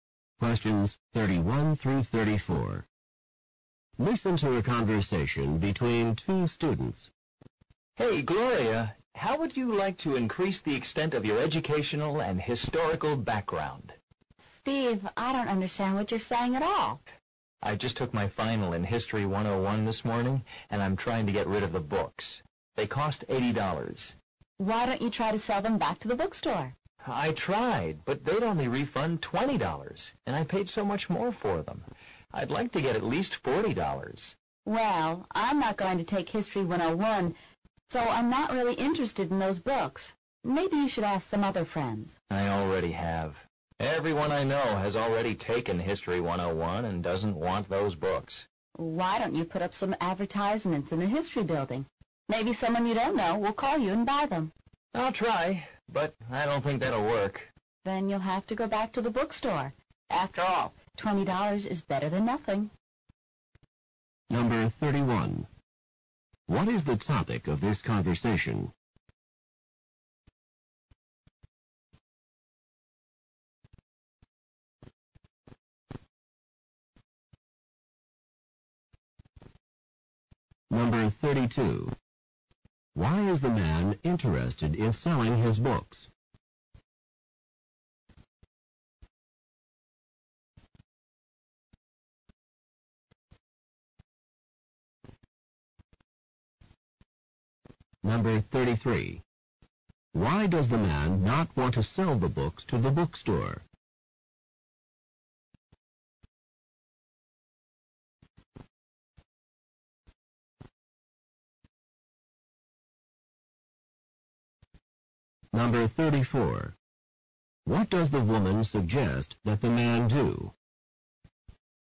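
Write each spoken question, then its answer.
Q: What is the topic of this conversation?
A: Selling the man's used History 101 books

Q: Why is the man interested in selling his books?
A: He has finished History 101 (took the final)

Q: Why does the man not want to sell the books to the bookstore?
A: The bookstore would only give him $20

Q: What does the woman suggest that the man do?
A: Put up advertisements in the history building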